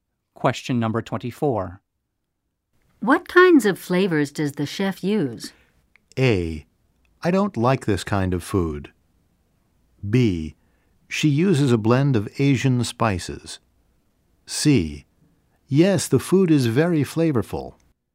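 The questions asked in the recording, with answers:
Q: What kinds of flavors does the chef use?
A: B: She uses a blend of Asian spices.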